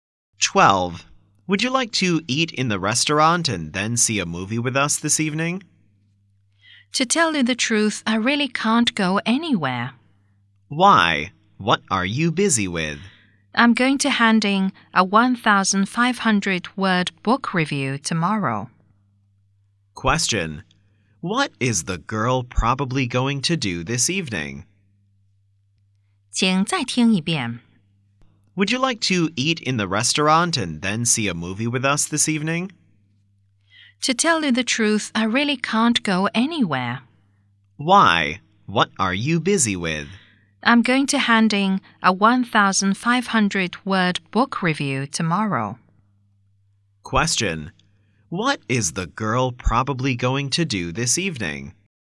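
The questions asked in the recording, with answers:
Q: Question: What is the girl probably going to do this evening?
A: Write a book review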